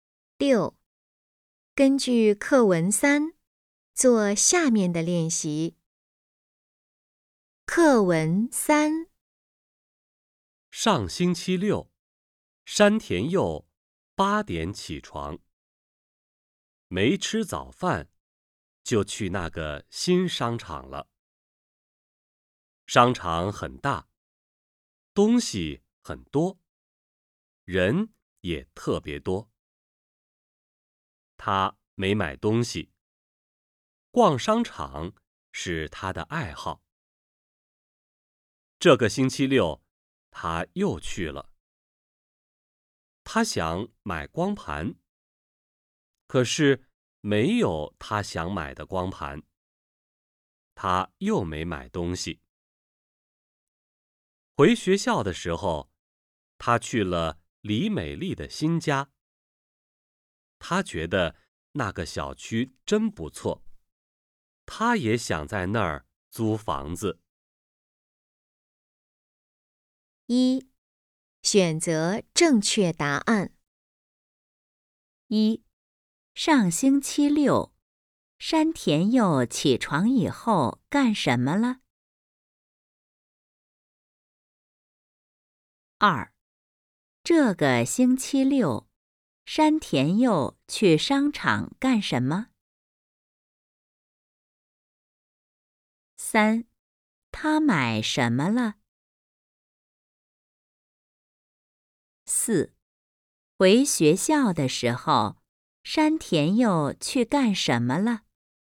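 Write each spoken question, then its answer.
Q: 上星期六,山田佑起床以后干什么了?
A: 没吃早饭,就去那个新商场了

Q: 这个星期六,山田佑去商场干什么?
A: 想买光盘

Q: 他买什么了?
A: 什么也没买

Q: 回学校的时候,山田佑去干什么了?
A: 去了李美丽的新家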